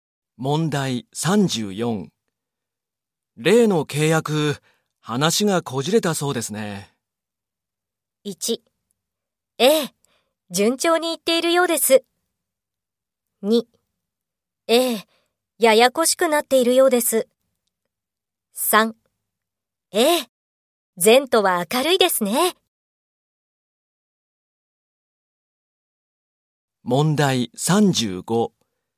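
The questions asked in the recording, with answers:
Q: 例の契約、話がこじれたそうですね。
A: 2: ええ、ややこしくなっているようです。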